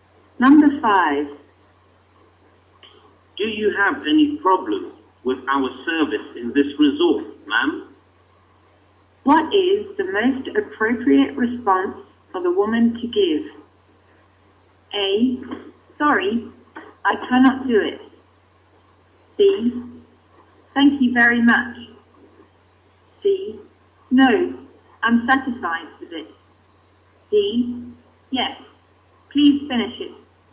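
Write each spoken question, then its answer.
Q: What is the most appropriate response for the woman to give?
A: C: No, I'm satisfied with it.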